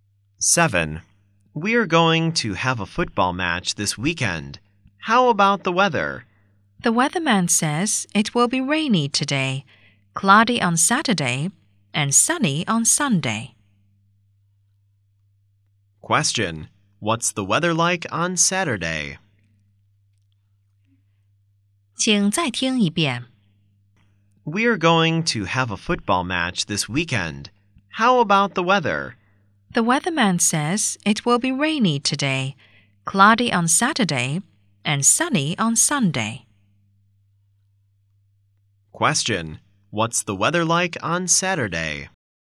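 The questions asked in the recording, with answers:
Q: what's the weather like on Saturday?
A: Cloudy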